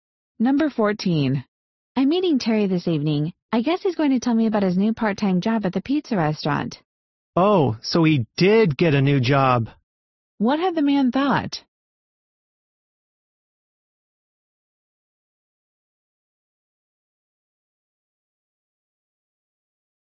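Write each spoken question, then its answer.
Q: What had the man thought?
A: That Terry had not gotten a new job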